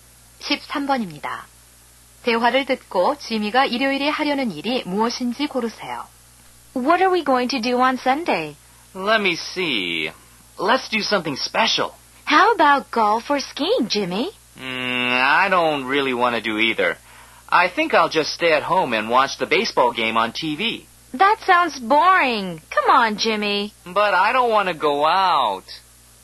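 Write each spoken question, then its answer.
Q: 대화를 듣고 지미가 일요일에 하려는 일이 무엇인지 고르세요.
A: 집에서 TV로 야구 경기 보기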